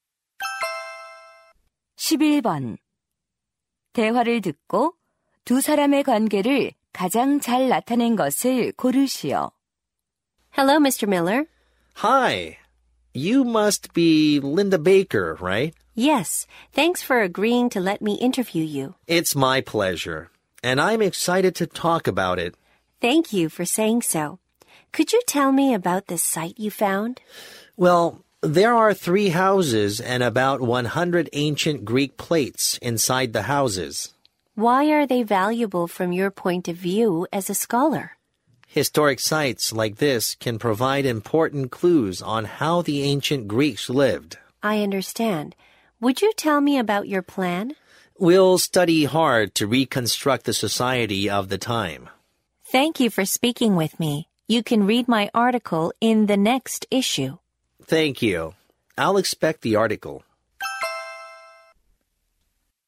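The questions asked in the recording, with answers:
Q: 대화를 듣고 두 사람의 관계를 가장 잘 나타낸 것을 고르시오.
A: 기자 - 고고학자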